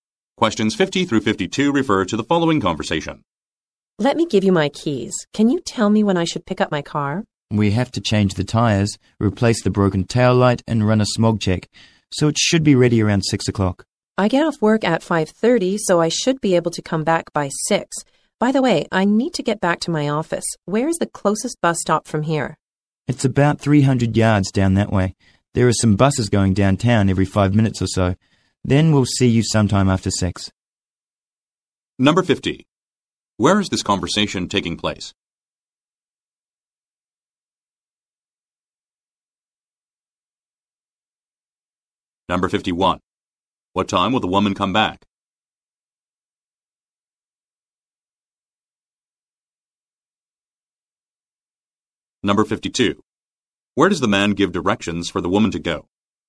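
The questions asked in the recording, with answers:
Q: Where is this conversation taking place?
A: At a car repair shop

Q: What time will the woman come back?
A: After 6 o'clock

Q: Where does the man give directions for the woman to go?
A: To the closest bus stop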